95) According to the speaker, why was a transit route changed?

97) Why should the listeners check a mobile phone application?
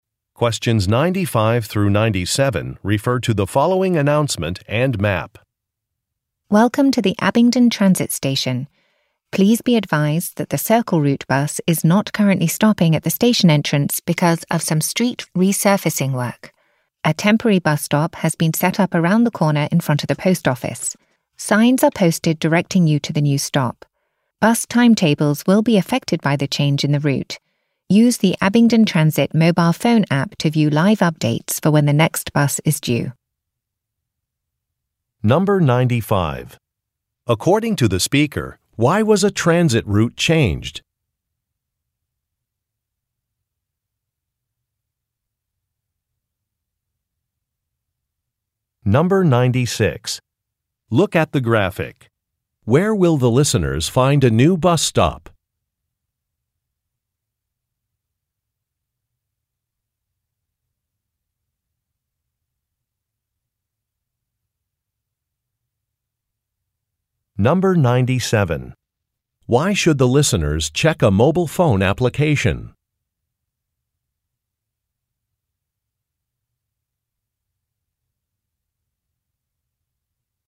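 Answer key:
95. Because of street resurfacing work
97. To see live updates on when the next bus is due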